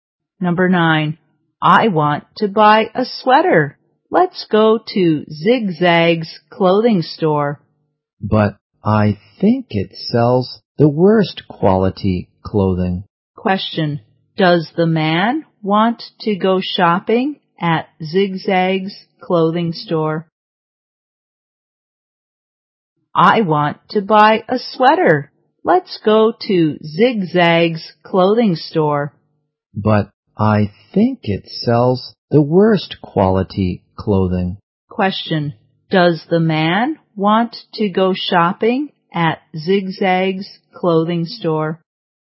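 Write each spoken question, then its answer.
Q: Question. Does the man want to go shopping at Zig Zag's clothing store?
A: No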